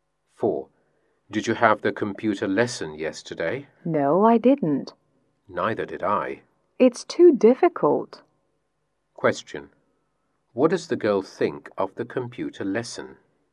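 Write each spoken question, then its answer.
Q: What does the girl think of the computer lesson?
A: It's too difficult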